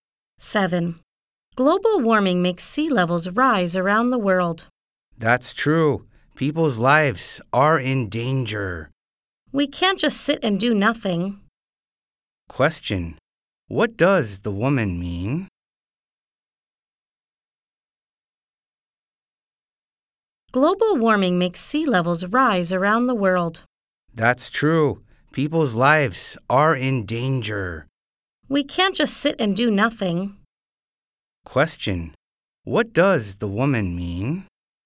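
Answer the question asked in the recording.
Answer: We must do something about global warming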